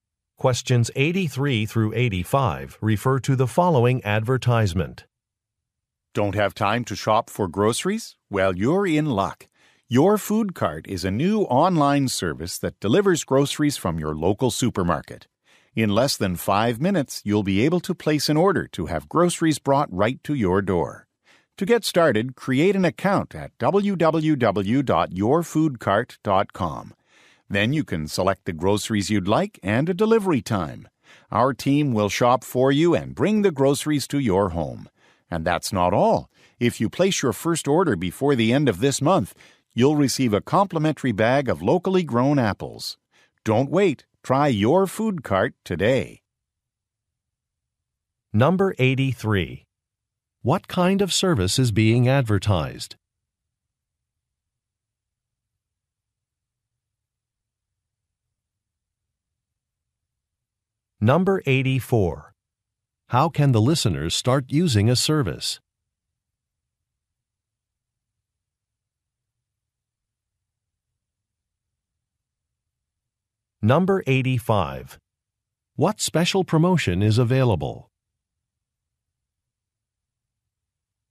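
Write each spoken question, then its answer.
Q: What kind of service is being advertised?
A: Online grocery delivery

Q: How can the listeners start using a service?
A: By creating an account on the website

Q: What special promotion is available?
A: A free bag of locally grown apples with the first order this month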